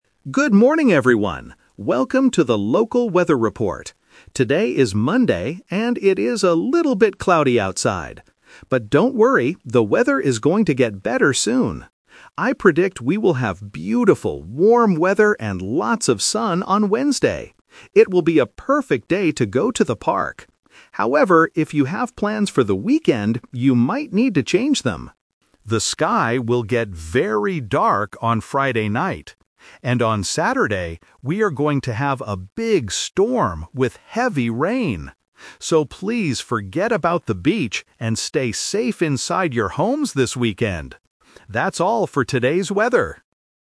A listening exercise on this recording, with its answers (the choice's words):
Listen to the morning weather report. Choose the correct answer (A, B, or C).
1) What kind of weather does the announcer predict for Wednesday?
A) Cloudy and cold.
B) Sunny and warm.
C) Rainy and windy.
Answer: Sunny and warm.

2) What will happen on Saturday?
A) The sky will get very dark.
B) There will be a big storm.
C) It will be a perfect day for the park.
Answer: There will be a big storm.

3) What does the announcer tell people to do this weekend?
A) Go to the beach.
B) Go to the park.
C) Stay inside their homes.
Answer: Stay inside their homes.

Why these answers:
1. The announcer says, "I predict we will have beautiful, warm weather and lots of sun on Wednesday."
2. The announcer explicitly states, "And on Saturday, we are going to have a big storm with heavy rain."
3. At the end, the announcer gives advice for the weekend: "stay safe inside your homes this weekend!"

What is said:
Good morning, everyone! Welcome to the local weather report. Today is Monday, and it is a little bit cloudy outside. But don't worry, the weather is going to get better soon! I predict we will have beautiful, warm weather and lots of sun on Wednesday. It will be a perfect day to go to the park. However, if you have plans for the weekend, you might need to change them. The sky will get very dark on Friday night. And on Saturday, we are going to have a big storm with heavy rain. So, please forget about the beach and stay safe inside your homes this weekend! That's all for today's weather.